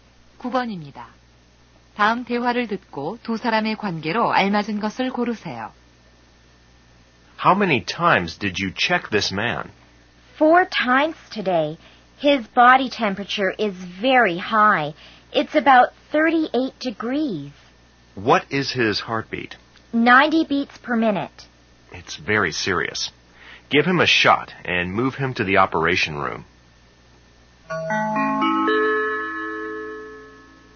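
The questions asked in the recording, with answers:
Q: 다음 대화를 듣고 두 사람의 관계로 알맞은 것을 고르세요.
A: 의사와 간호사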